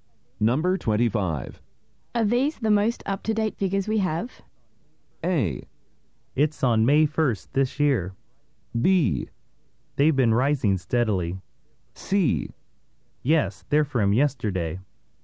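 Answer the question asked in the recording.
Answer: C: Yes, they're from yesterday.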